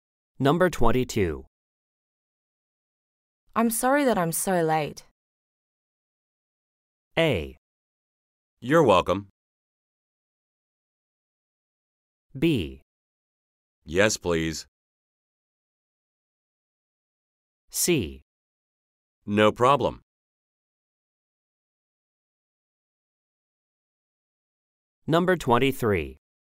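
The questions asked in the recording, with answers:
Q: I'm sorry that I'm so late.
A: C: No problem.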